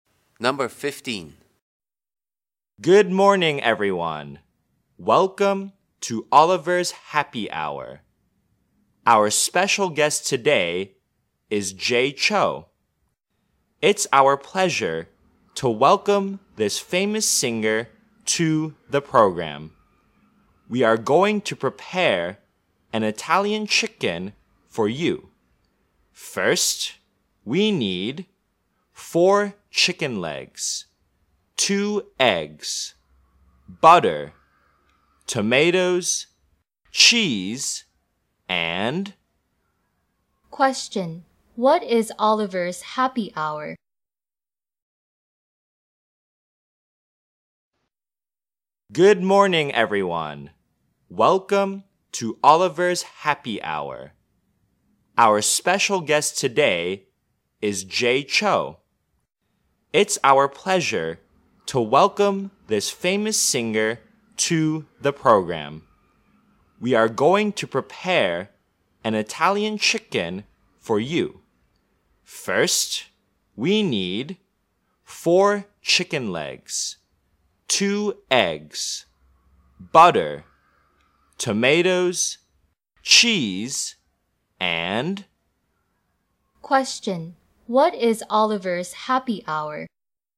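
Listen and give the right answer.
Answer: A cooking show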